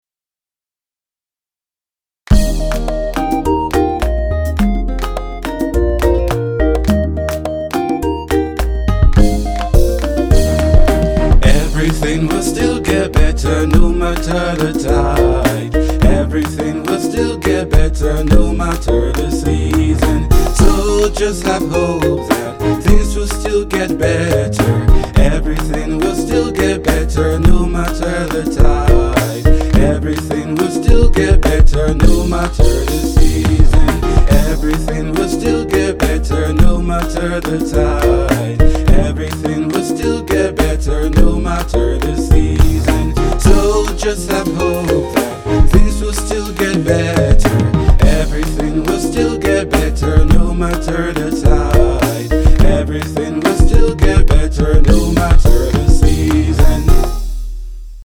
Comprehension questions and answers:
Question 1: What can we learn about hope from the song?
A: Things will get better so we should have hope.